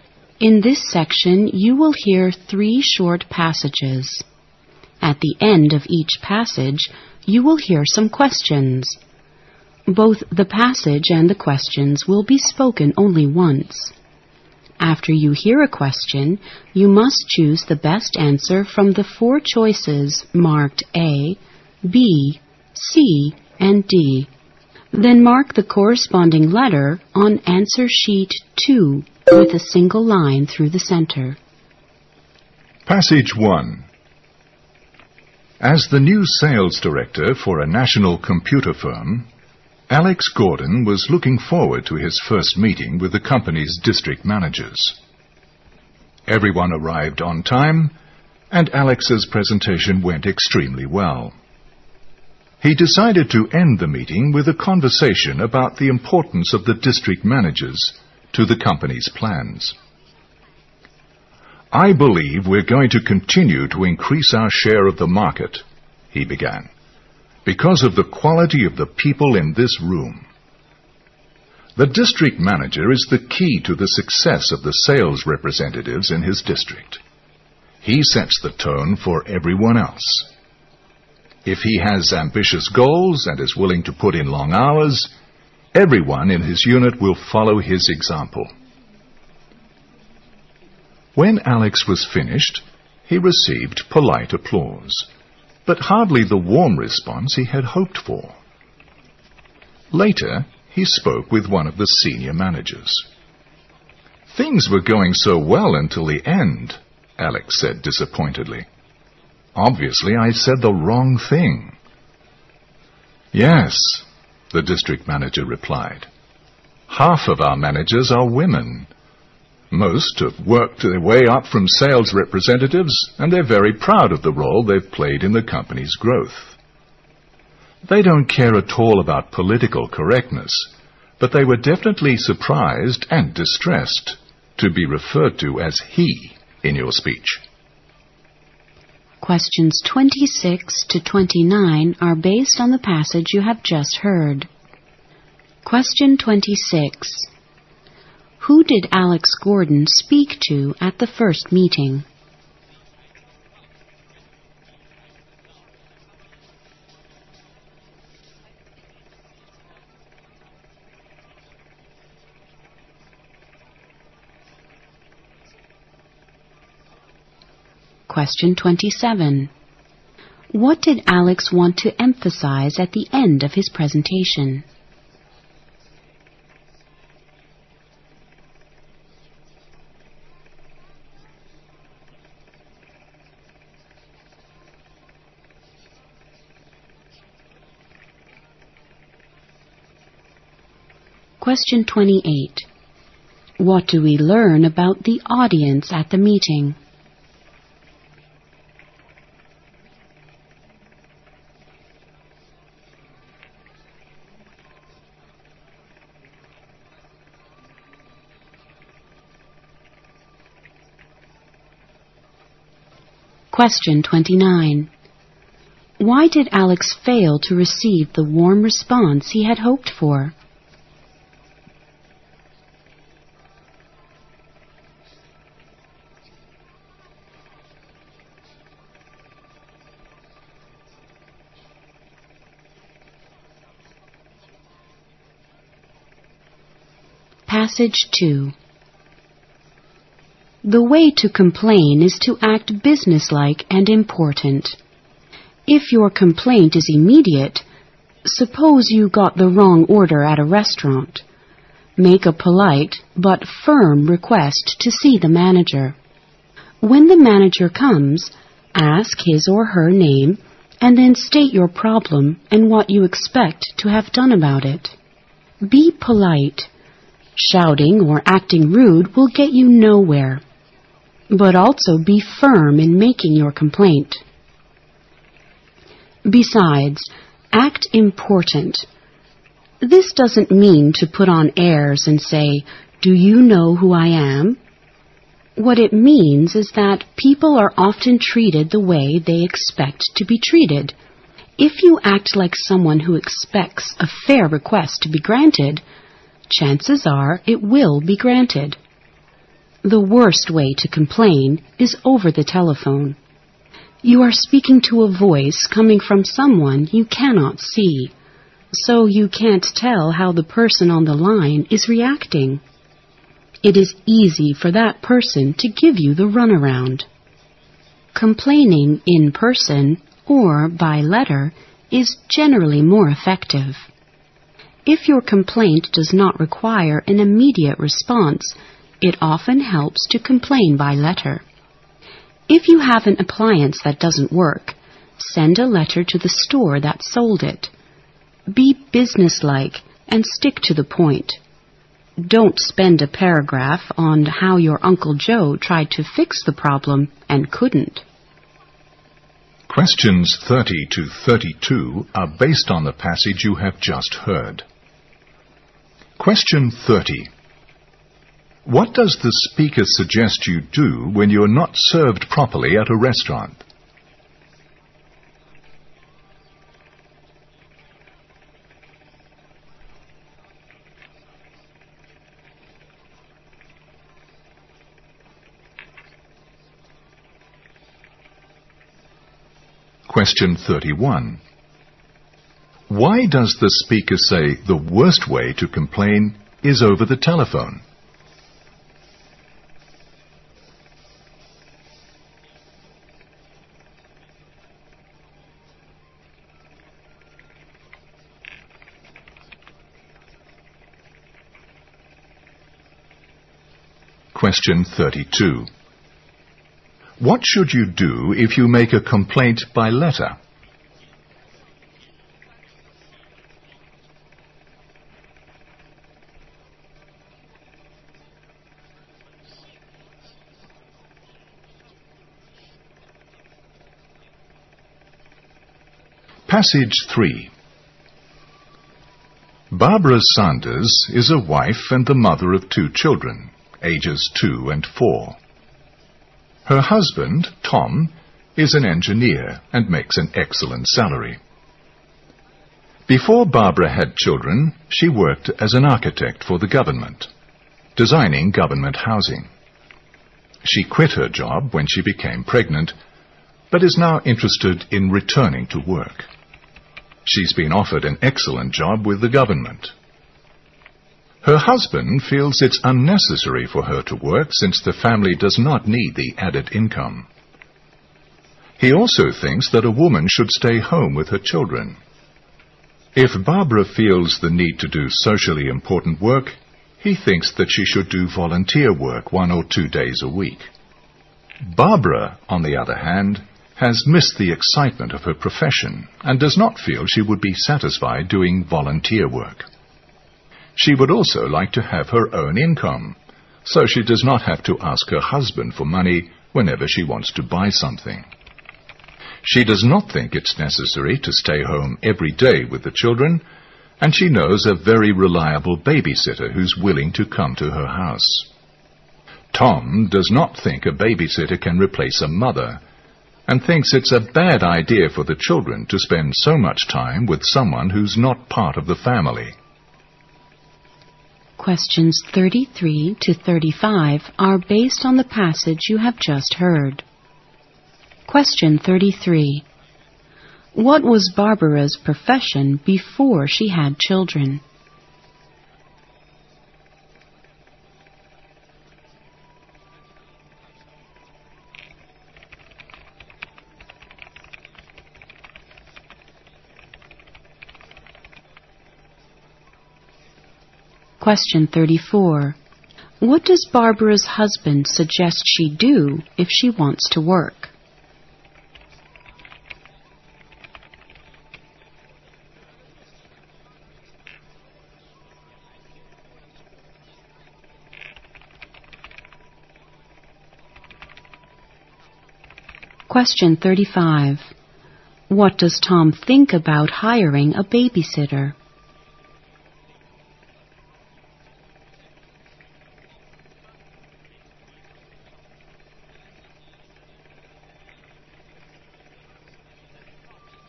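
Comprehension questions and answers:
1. Who did Alex Gordon speak to at the first meeting?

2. What did Alex want to emphasize at the end of his presentation?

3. What do we learn about the audience at the meeting?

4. Why did Alex fail to receive the warm response he had hoped for?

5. What does the speaker suggest you do when you are not served properly at a restaurant?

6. Why does the speaker say the worst way to complain is over the telephone?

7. What should you do if you make a complaint by letter?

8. What was Barbara's profession before she had children?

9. What does Barbara's husband suggest she do if she wants to work?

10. What does Tom think about hiring a babysitter?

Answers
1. The company's district managers.
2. The importance of the district managers to the company's plans.
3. Half of them were women.
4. He referred to the district managers as "he".
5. Politely but firmly ask to see the manager.
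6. You can't tell how the person on the line is reacting.
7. Be businesslike and stick to the point.
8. She was an architect.
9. Do volunteer work one or two days a week.
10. A babysitter cannot replace a mother.

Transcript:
Q25 Supposing the man had children, what would he expect them to do with their pocket money?
As the new sales director for a national computer firm, Alex Gordon was looking forward to his first meeting with the company's district managers. Every one arrived on time and Alex's presentation went extremely well. He decided to end the meeting with a conversation about the importance of the district managers to the company's plans. " I believe we're going to continue to increase our share of the market", he began, "Because of the quality of the people in this room. The district manager is the key to the success of the sales representatives in his district. He sets the tone for everyone else. 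If he has ambitious goals and is willing to put in long hours, everyone in his unit will follow his example." When Alex was finished, he received polite applause but hardly the warm response he had hoped for. Later, he spoke with one of the senior managers. "Things were going so well until the end", Alex said disappointedly, "Obviously I said the wrong thing." "Yes", the district manager replied, " Half of our managers are women. Most have worked the way up from sales representatives and they are very proud of the role they've played in the company's growth. They don't care at all about the political correctness but they are definitely surprised and distressed to be referred to as "he" in your speech."
Questions 26 to 29 are based on the passage you have just heard.
The way to complain is to act business-like and important. If your complaint is immediate, suppose you got the wrong order at a restaurant, make a polite but firm request to see the manager. 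When the manager comes, ask his or her name and then state your problem, and what you expect to have done about it. Be polite. Shouting or acting rude will get you nowhere. But also be firm in making your complaint. Besides, act important. This doesn't mean to put on airs and say, "Do you know who I am?" What it means is that people are often treated the way they expect to be treated. If you act like someone who expects a fair request be granted, chances are it will be granted. The worst way to complain is over the telephone. You are speaking to a voice coming from someone you can not see, so you can't tell how the person on the line is reacting. It is easy for that person to give you a run-around. Complaining in person or by letter is generally more effective. If your complaint does not require an immediate response, it often helps to complain by letter. If you have an appliance that doesn't work, send a letter to the store that sold it. 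Be business-like and stick to the point. Don't spend a paragraph on how your Uncle Joe tried to fix the problem and couldn't.
Question 30: What does the speaker suggest you do when you are not served properly at a restaurant?
Question 32: What should you do if you make a complaint by letter?
Barbara Santos is a wife and the mother of 2 children, ages 2 and 4. Her husband, Tom, is an engineer and makes an excellent salary. Before Barbara had children, she worked as an architect for the government, designing government housing. She quit her job when she became pregnant, but is now interested in returning to work. She's been offered an excellent job with the government. Her husband feels it's unnecessary for her to work since the family does not need the added income. He also thinks that a woman should stay home with her children. If Barbara feels the need to do socially important work, he thinks that she should do volunteer work one or two days a week. 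Barbara, on the other hand, has missed the excitement of her profession, and does not feel she would be satisfied doing volunteer work. She would also like to have her own income, so she does not have to ask her husband for money whenever she wants to buy something. She does not think it's necessary to stay home every day with the children, and she knows a very reliable babysitter who's willing to come to her house. Tom does not think a babysitter can replace a mother, and thinks it's a bad idea for the children to spend so much time with someone who's not part of the family.

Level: 四级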